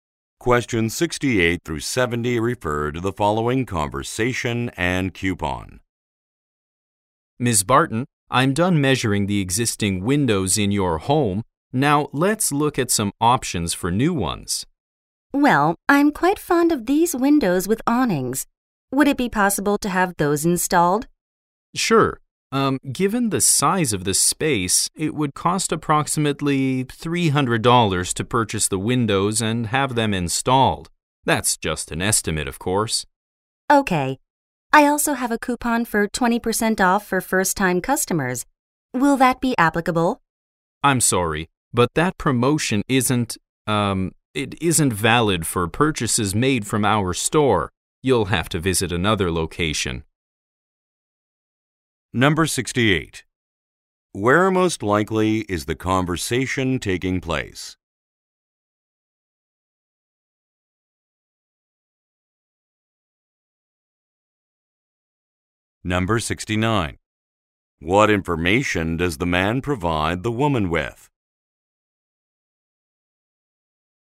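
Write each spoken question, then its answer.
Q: Where most likely is the conversation taking place?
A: In Ms. Barton's home

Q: What information does the man provide the woman with?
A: A cost estimate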